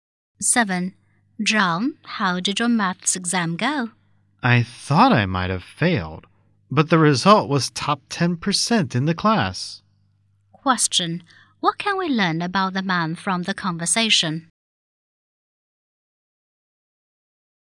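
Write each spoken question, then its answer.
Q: What can we learn about the man from the conversation?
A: He did well in the maths exam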